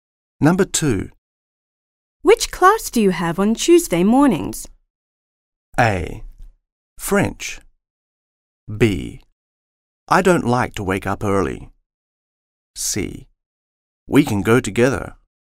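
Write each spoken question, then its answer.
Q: Which class do you have on Tuesday mornings?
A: A: French.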